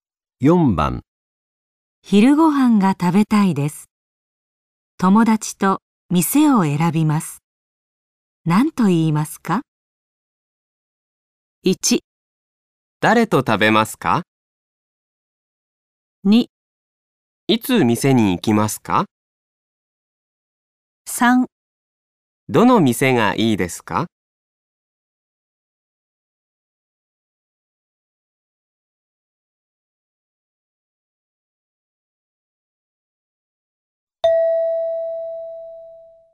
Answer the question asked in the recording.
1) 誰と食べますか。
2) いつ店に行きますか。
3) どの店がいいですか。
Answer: 3) どの店がいいですか。

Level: N5 Listening · Test 3